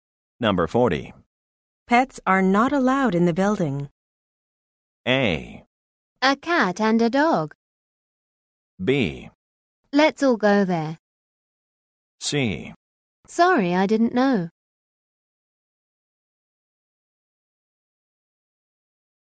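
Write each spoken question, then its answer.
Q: Pets are not allowed in the building.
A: C: Sorry, I didn't know.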